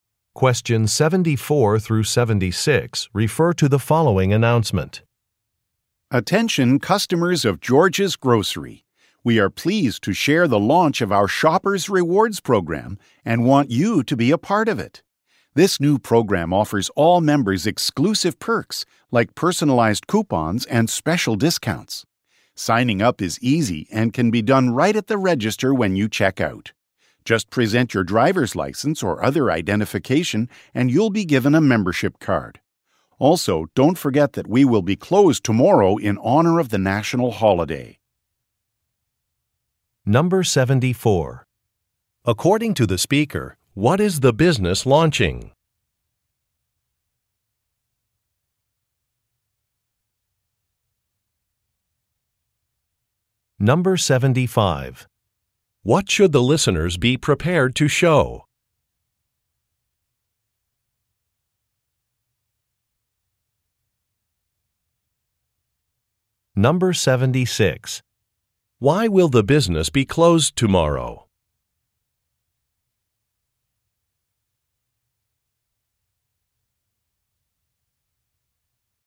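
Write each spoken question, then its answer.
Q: According to the speaker, what is the business launching?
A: A rewards program

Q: What should the listeners be prepared to show?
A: A driver's license or other identification

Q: Why will the business be closed tomorrow?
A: For a national holiday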